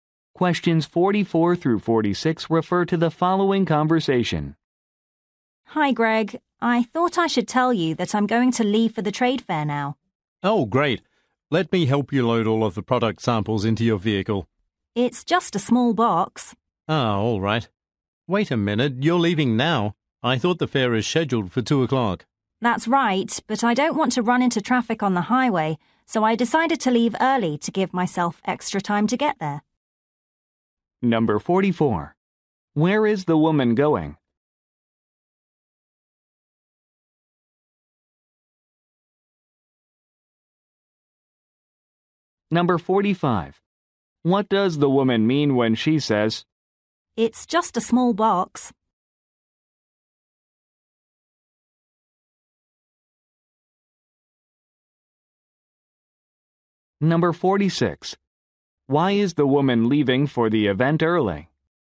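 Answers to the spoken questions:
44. To a trade fair
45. She doesn't need help loading
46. To avoid traffic on the highway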